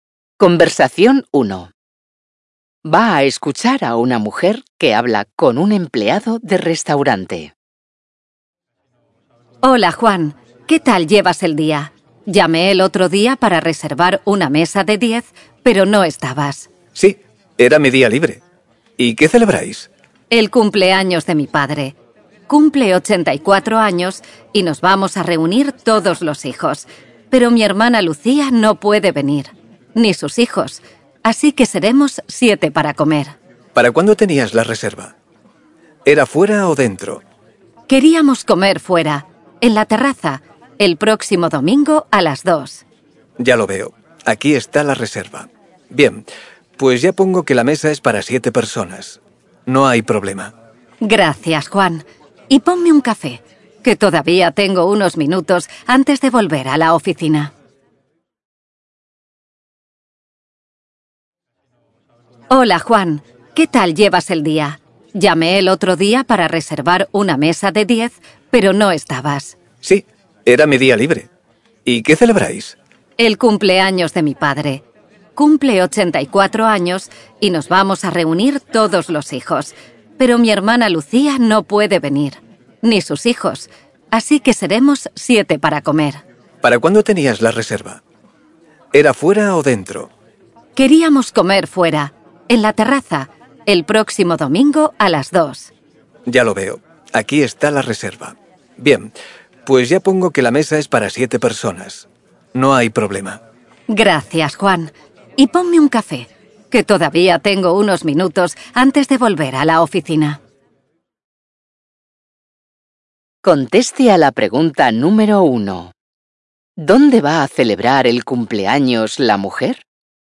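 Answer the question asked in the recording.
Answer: En la terraza de un restaurante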